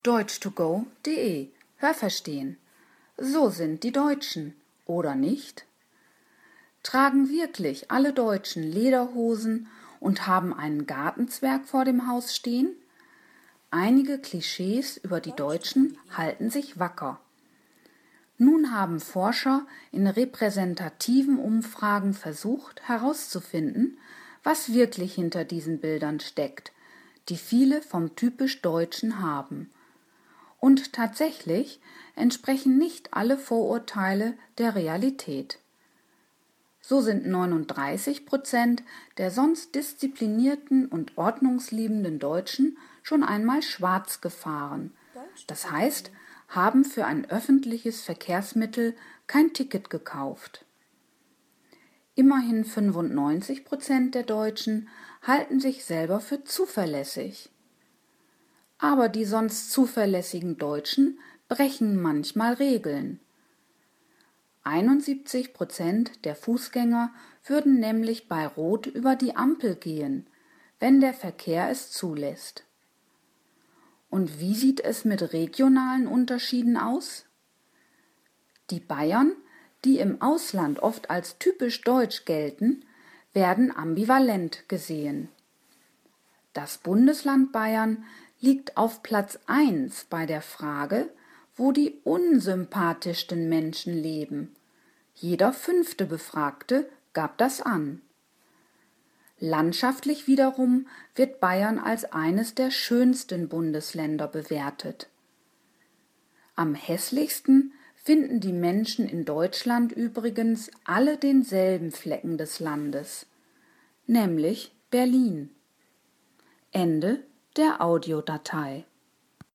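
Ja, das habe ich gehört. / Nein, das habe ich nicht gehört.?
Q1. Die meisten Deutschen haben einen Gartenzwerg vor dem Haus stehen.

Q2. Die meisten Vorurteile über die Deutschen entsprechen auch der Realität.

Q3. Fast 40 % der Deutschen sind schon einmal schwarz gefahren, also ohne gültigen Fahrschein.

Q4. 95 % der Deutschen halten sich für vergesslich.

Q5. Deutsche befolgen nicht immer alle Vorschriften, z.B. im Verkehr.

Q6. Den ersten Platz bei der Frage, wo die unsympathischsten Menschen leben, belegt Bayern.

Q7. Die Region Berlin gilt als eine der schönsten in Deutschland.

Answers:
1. Ja, das habe ich gehört.
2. Nein, das habe ich nicht gehört.
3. Ja, das habe ich gehört.
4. Nein, das habe ich nicht gehört.
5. Ja, das habe ich gehört.
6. Ja, das habe ich gehört.
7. Nein, das habe ich nicht gehört.

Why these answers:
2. Eine Umfrage bestätigt, dass dies nicht der Fall ist.

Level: C1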